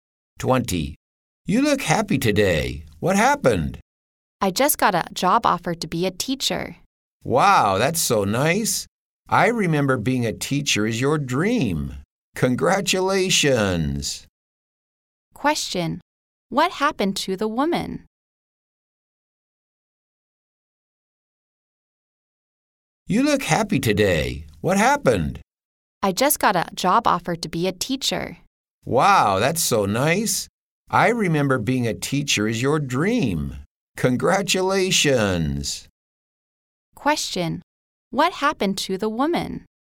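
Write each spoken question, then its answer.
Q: What happened to the woman?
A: She got a job offer to be a teacher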